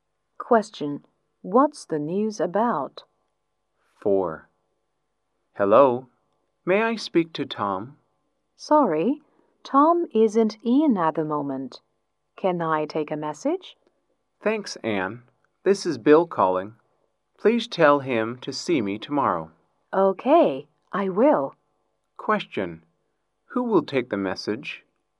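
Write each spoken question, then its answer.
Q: Who will take the message?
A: Anne.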